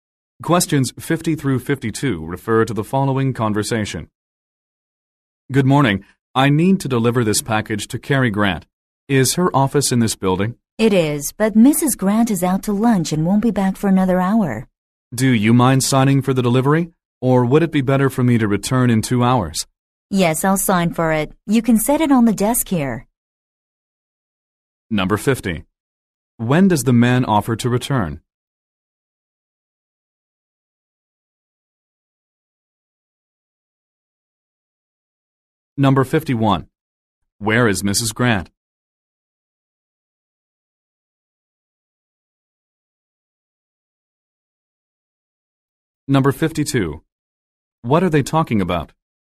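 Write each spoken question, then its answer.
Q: When does the man offer to return?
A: In 2 hours

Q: Where is Mrs. Grant?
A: Out to lunch

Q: What are they talking about?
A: Delivering a package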